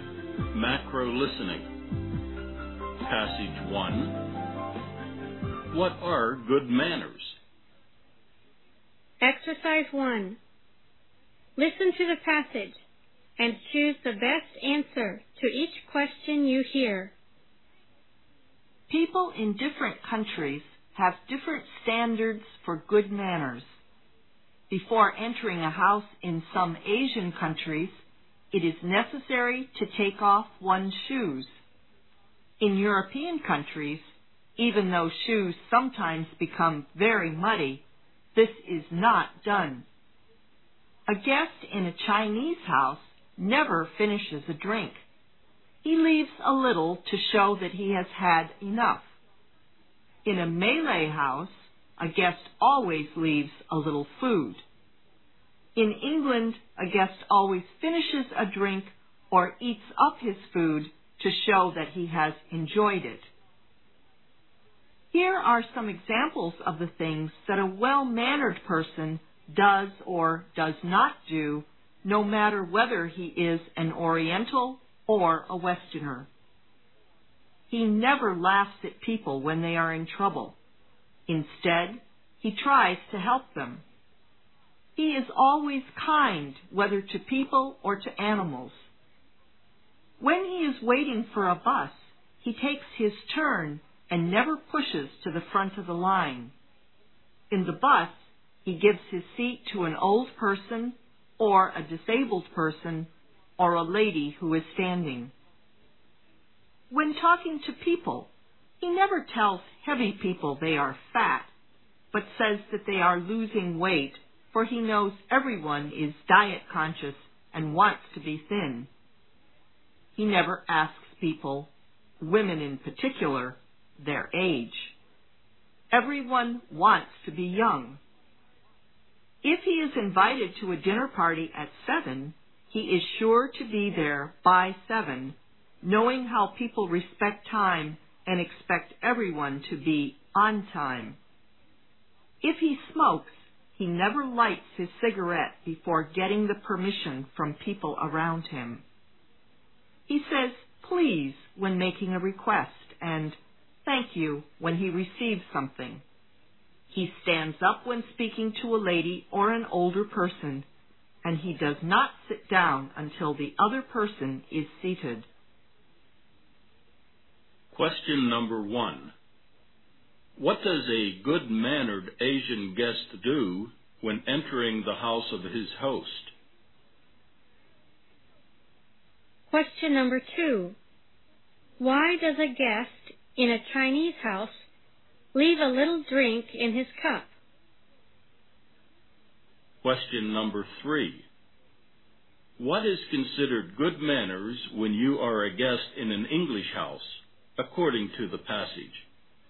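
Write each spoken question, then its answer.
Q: What does a good-mannered Asian guest do when entering the house of his host?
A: He takes off his shoes

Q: Why does a guest in a Chinese house leave a little drink in his cup?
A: To show that he has had enough

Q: What is considered good manners when you are a guest in an English house, according to the passage?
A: Finishing your drink or eating up your food to show you enjoyed it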